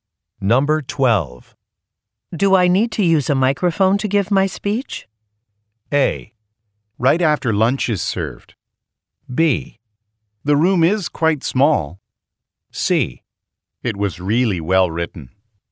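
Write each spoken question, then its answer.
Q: Do I need to use a microphone to give my speech?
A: B: The room is quite small.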